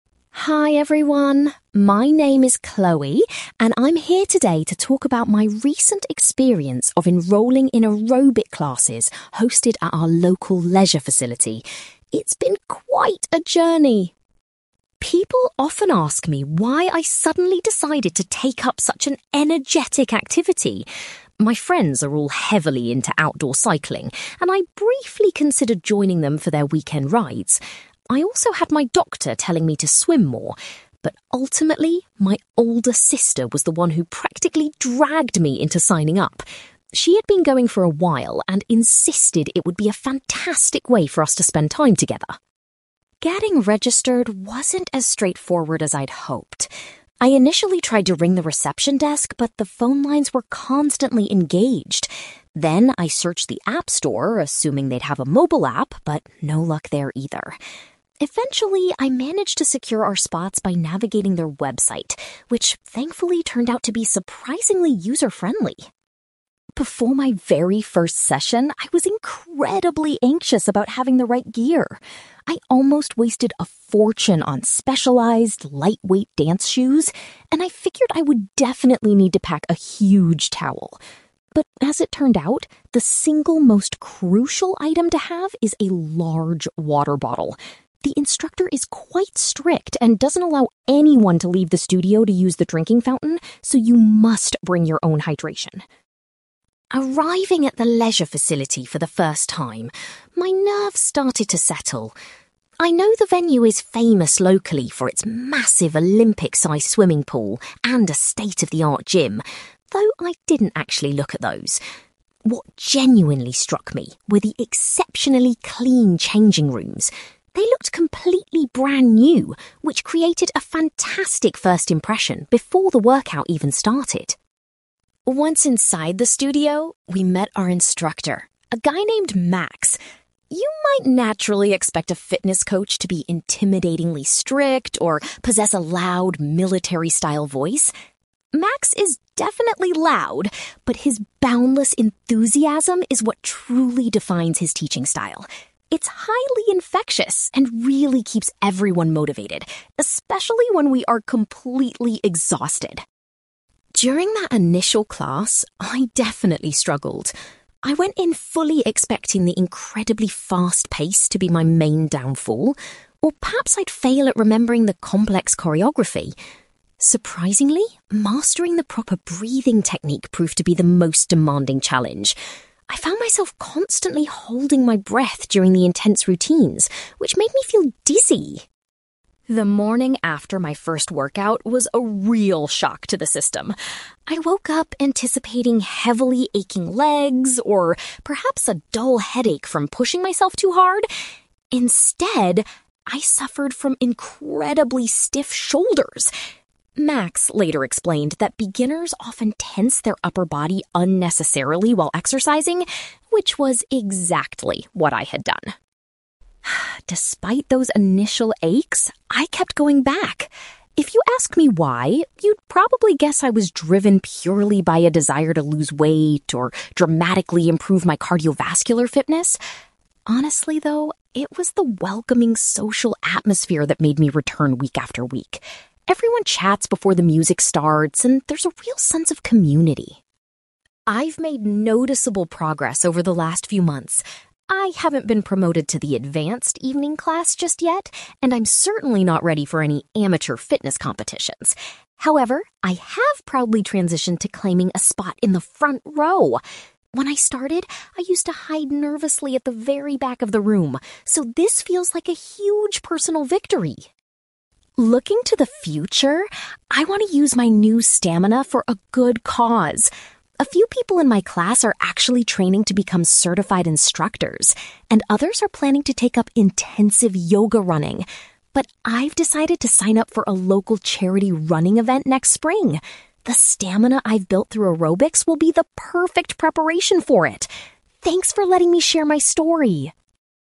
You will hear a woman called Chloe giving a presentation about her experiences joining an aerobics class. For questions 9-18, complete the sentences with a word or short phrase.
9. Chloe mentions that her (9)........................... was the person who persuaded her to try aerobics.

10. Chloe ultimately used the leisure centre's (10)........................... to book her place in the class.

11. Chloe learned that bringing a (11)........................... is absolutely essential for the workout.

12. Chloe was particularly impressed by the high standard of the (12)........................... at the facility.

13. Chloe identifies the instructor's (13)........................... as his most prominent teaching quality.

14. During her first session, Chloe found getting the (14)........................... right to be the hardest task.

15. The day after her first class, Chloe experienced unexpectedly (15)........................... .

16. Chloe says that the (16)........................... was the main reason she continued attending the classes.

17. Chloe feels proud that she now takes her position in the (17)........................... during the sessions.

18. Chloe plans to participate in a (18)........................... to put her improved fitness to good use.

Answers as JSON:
{"9": "older sister", "10": "website", "11": "water bottle", "12": "changing rooms", "13": "enthusiasm", "14": "breathing technique", "15": "stiff shoulders", "16": "social atmosphere", "17": "front row", "18": "running event"}

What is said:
Chloe: Hi everyone. My name is Chloe, and I'm here today to talk about my recent experience of enrolling in aerobic classes hosted at our local leisure facility. It's been quite a journey!
People often ask me why I suddenly decided to take up such an energetic activity. My friends are all heavily into outdoor cycling, and I briefly considered joining them for their weekend rides. I also had my doctor telling me to swim more. But ultimately, my older sister was the one who practically dragged me into signing up. She had been going for a while and insisted it would be a fantastic way for us to spend time together.
Getting registered wasn't as straightforward as I'd hoped. I initially tried to ring the reception desk, but the phone lines were constantly engaged. Then I searched the app store, assuming they'd have a mobile app, but no luck there either. Eventually, I managed to secure our spots by navigating their website, which thankfully turned out to be surprisingly user-friendly.
Before my very first session, I was incredibly anxious about having the right gear. I almost wasted a fortune on specialized, lightweight dance shoes, and I figured I would definitely need to pack a huge towel. But as it turned out, the single most crucial item to have is a large water bottle. The instructor is quite strict and doesn't allow anyone to leave the studio to use the drinking fountain, so you must bring your own hydration.
Arriving at the leisure facility for the first time, my nerves started to settle. I know the venue is famous locally for its massive Olympic-sized swimming pool and a state-of-the-art gym, though I didn't actually look at those. What genuinely struck me were the exceptionally clean changing rooms. They looked completely brand new, which created a fantastic first impression before the workout even started.
Once inside the studio, we met our instructor, a guy named Max. You might naturally expect a fitness coach to be intimidatingly strict or possess a loud, military-style voice. Max is definitely loud, but his boundless enthusiasm is what truly defines his teaching style. It's highly infectious and really keeps everyone motivated, especially when we are completely exhausted.
During that initial class, I definitely struggled. I went in fully expecting the incredibly fast pace to be my main downfall, or perhaps I'd fail at remembering the complex choreography. Surprisingly, mastering the proper breathing technique proved to be the most demanding challenge. I found myself constantly holding my breath during the intense routines, which made me feel dizzy!
The morning after my first workout was a real shock to the system. I woke up anticipating heavily aching legs or perhaps a dull headache from pushing myself too hard. Instead, I suffered from incredibly stiff shoulders. Max later explained that beginners often tense their upper body unnecessarily while exercising, which was exactly what I had done.
Despite those initial aches, I kept going back. If you asked me why, you'd probably guess I was driven purely by a desire to lose weight or dramatically improve my cardiovascular fitness. Honestly, though, it was the welcoming social atmosphere that made me return week after week. Everyone chats before the music starts, and there's a real sense of community.
I've made noticeable progress over the last few months. I haven't been promoted to the advanced evening class just yet, and I'm certainly not ready for any amateur fitness competitions! However, I have proudly transitioned to claiming a spot in the front row. When I started, I used to hide nervously at the very back of the room, so this feels like a huge personal victory.
Looking to the future, I want to use my new stamina for a good cause. A few people in my class are actually training to become certified instructors, and others are planning to take up intensive yoga. But I've decided to sign up for a local charity running event next spring. The stamina I've built through aerobics will be the perfect preparation for it. Thanks for letting me share my story!

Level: B2